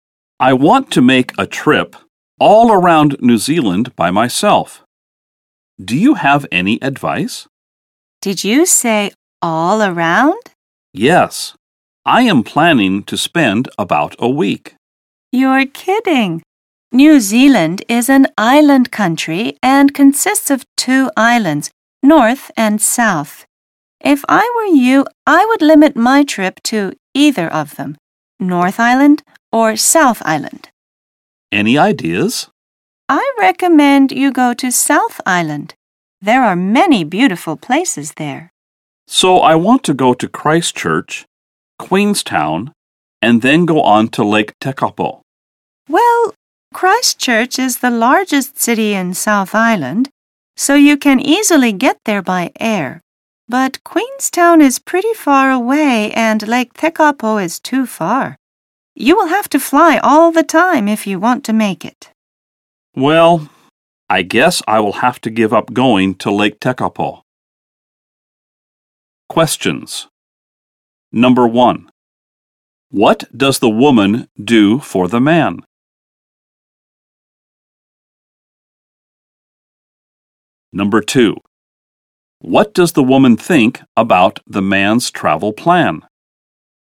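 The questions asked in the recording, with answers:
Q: What does the woman do for the man?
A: She gives him advice on his trip around New Zealand.

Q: What does the woman think about the man's travel plan?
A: She thinks it is too much for one week and he should limit it to one island.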